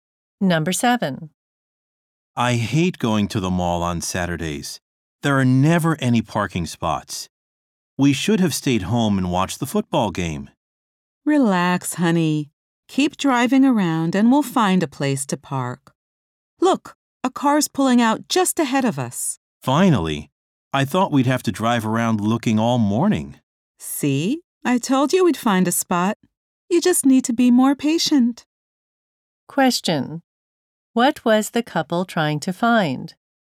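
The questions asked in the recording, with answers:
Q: What was the couple trying to find?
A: A parking spot.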